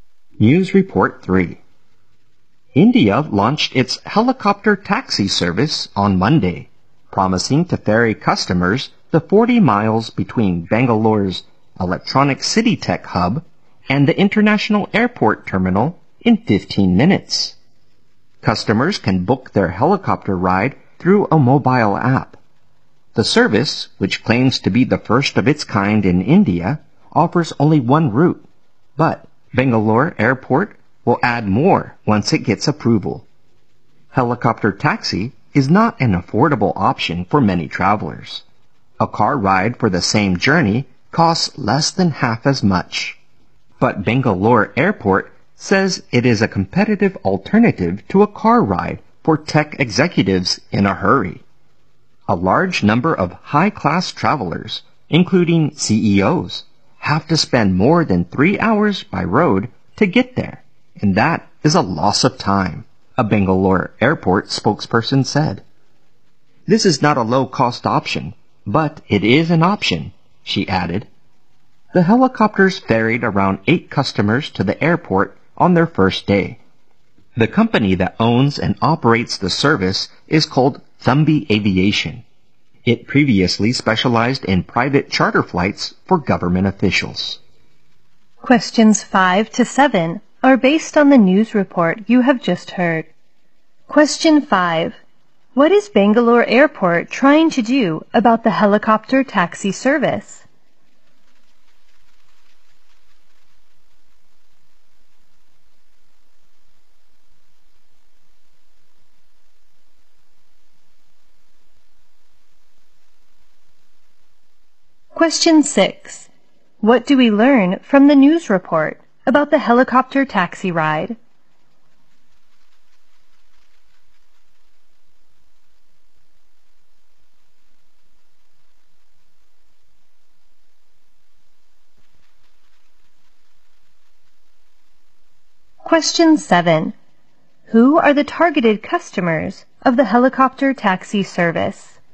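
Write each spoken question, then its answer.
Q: Who are the targeted customers of the helicopter taxi service?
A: Tech executives in a hurry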